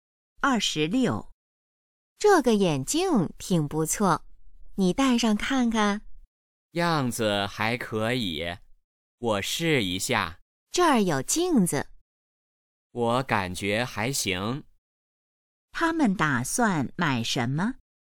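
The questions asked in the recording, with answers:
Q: 他们打算买什么?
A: 眼镜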